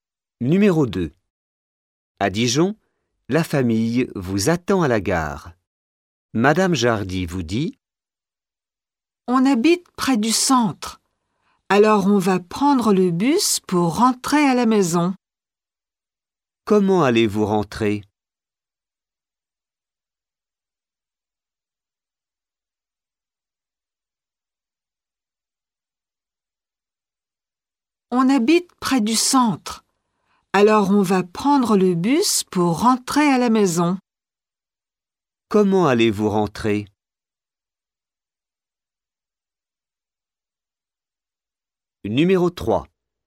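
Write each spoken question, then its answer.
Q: Comment allez-vous rentrer ?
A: En bus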